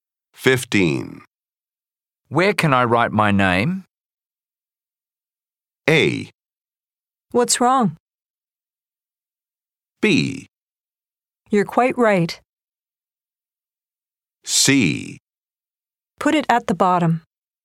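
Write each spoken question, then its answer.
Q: Where can I write my name?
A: C: Put it at the bottom.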